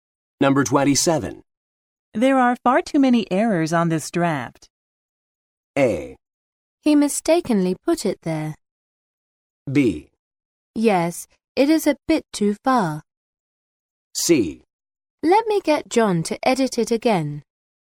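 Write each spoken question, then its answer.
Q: There are far too many errors on this draft.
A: C: Let me get John to edit it again.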